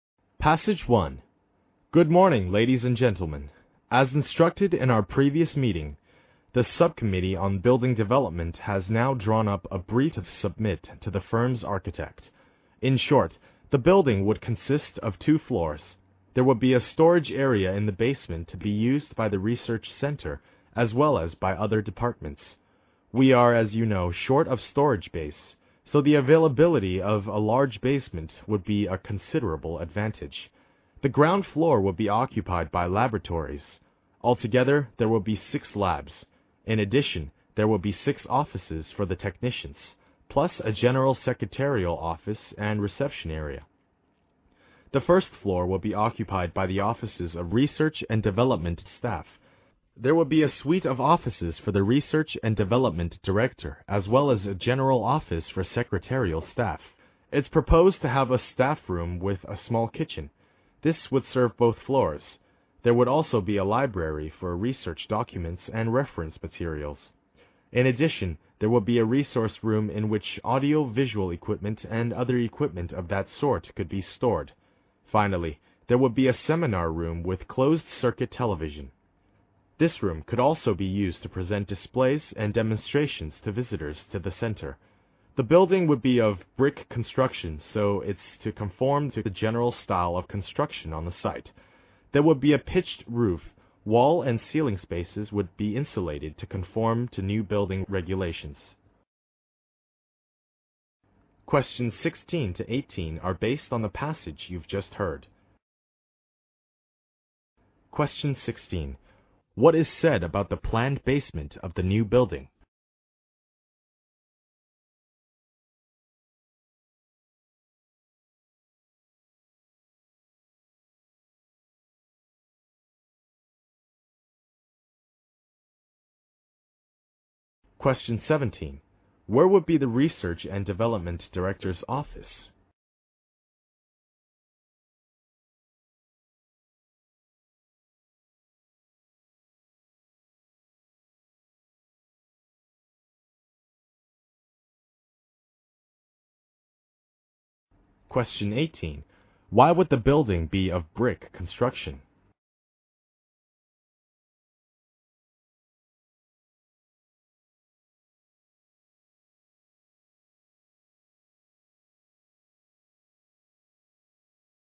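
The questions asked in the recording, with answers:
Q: What is said about the planned basement of the new building?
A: It will be a large storage area shared by the research center and other departments.

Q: Where would be the Research and Development Director's office?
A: On the first floor.

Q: Why would the building be of brick construction?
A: To match the general style of construction on the site.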